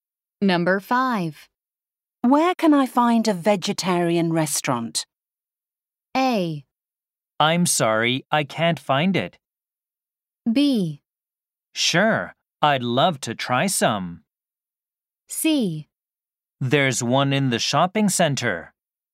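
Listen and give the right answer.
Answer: C: There's one in the shopping center.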